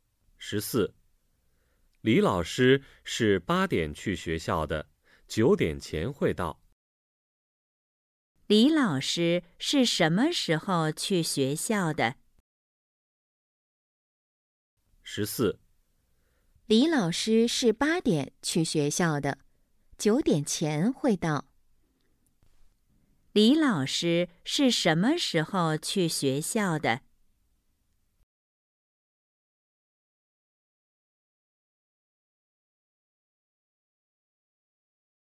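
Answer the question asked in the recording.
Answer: 八点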